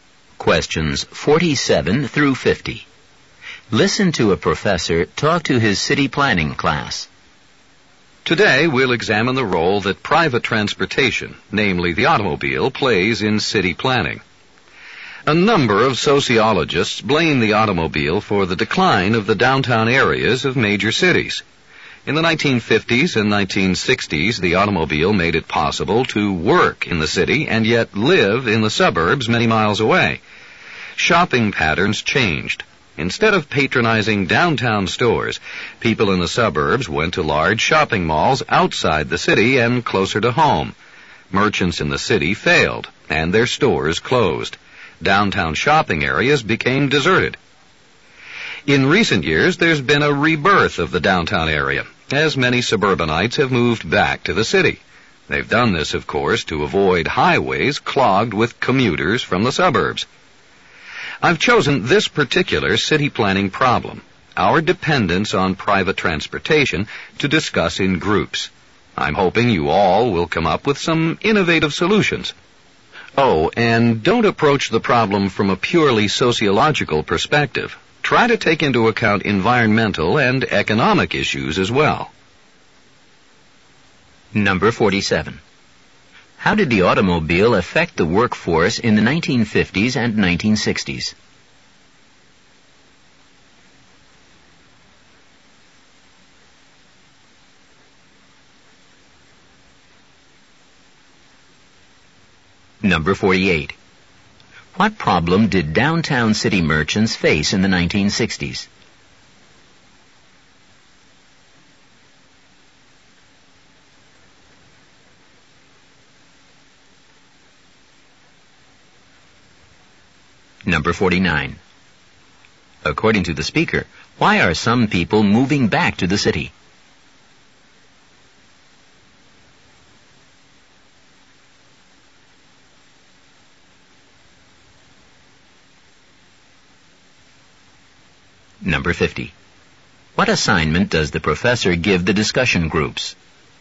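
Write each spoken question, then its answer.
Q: How did the automobile affect the workforce in the 1950s and 1960s?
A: It let people work in the city while living in the suburbs far away

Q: What problem did downtown city merchants face in the 1960s?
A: Shoppers went to suburban malls instead, so their stores failed and closed

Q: According to the speaker, why are some people moving back to the city?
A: To avoid highways clogged with commuters

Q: What assignment does the professor give the discussion groups?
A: To come up with innovative solutions to our dependence on private transportation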